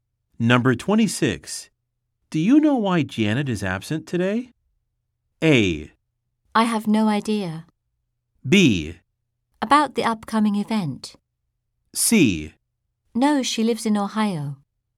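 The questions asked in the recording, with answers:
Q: Do you know why Janet is absent today?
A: A: I have no idea.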